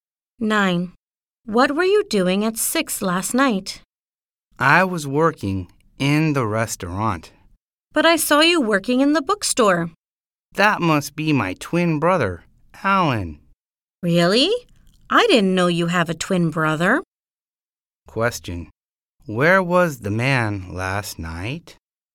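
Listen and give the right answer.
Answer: In the restaurant.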